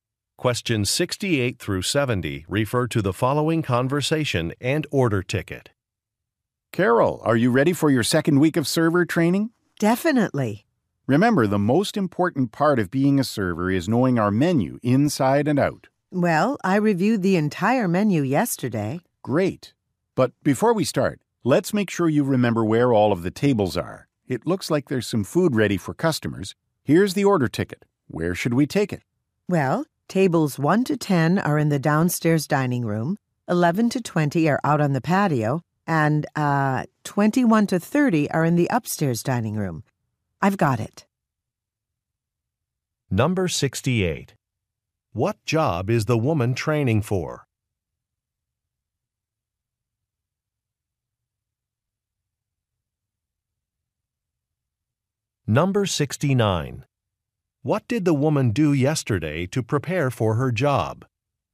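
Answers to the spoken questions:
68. Server
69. She reviewed the whole menu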